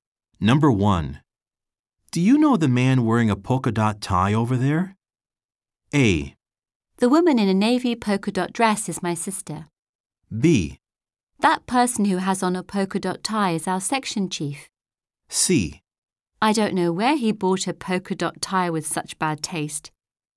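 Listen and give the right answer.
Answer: B: That person who has on a polka dot tie is our section chief.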